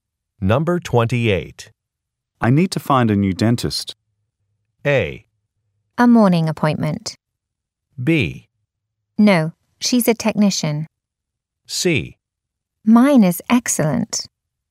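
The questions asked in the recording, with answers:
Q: I need to find a new dentist.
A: C: Mine is excellent.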